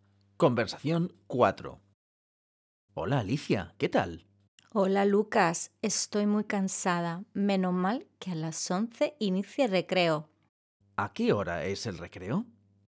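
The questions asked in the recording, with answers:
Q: ¿A qué hora es el recreo?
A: a las 11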